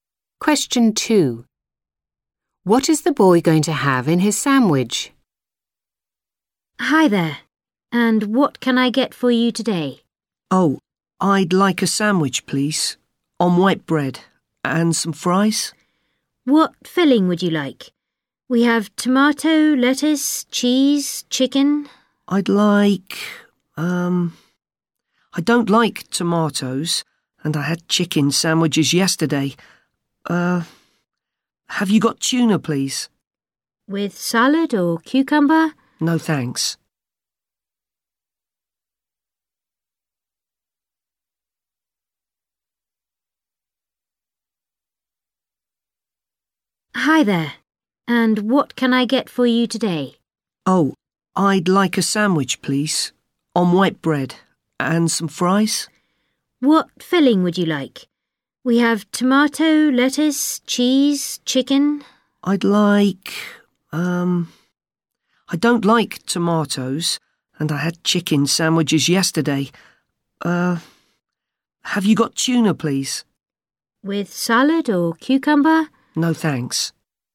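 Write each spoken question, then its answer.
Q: What is the boy going to have in his sandwich?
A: Tuna (only)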